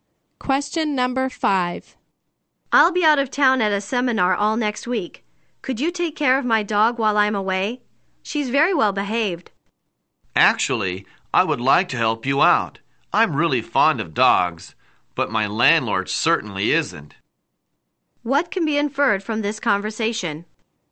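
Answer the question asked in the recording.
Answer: The woman cannot look after the dog because her landlord does not allow dogs.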